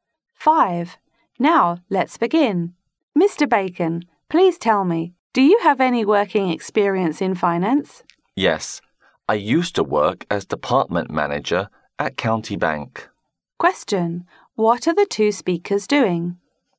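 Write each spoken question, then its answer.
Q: What are the two speakers doing?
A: Having a job interview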